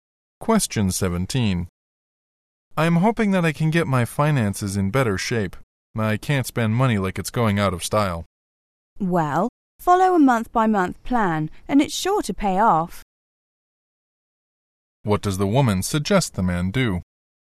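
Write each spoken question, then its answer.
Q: What does the woman suggest the man do?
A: Follow a month-by-month budget plan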